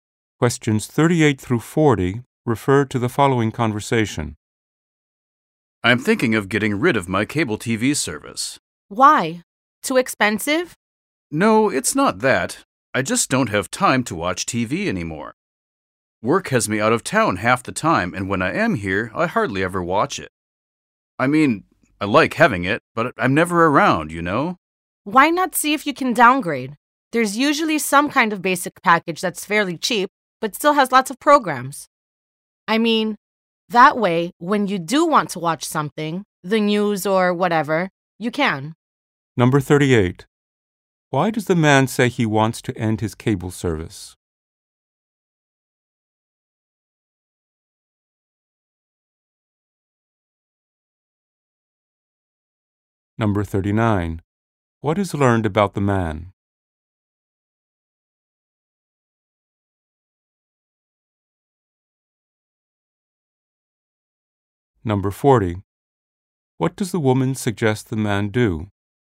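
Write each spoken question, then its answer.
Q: Why does the man say he wants to end his cable service?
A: He doesn't have time to watch TV anymore

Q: What is learned about the man?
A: He is often out of town for work

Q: What does the woman suggest the man do?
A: Downgrade to a cheaper basic package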